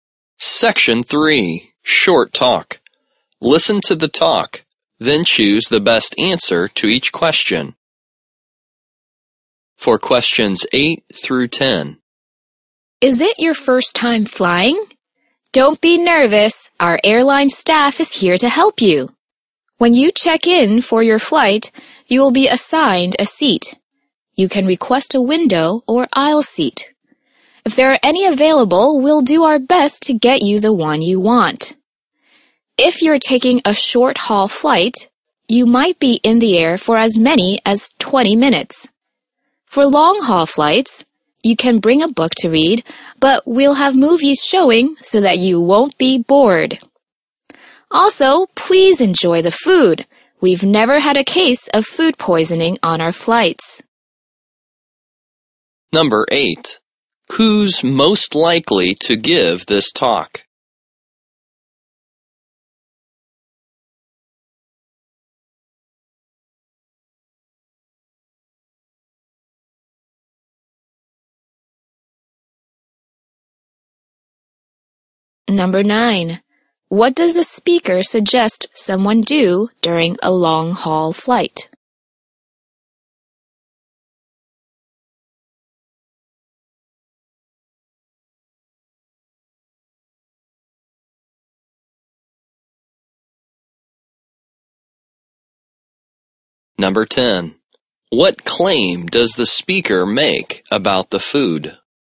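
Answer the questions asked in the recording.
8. An airline staff member
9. Bring a book to read
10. There has never been a case of food poisoning on their flights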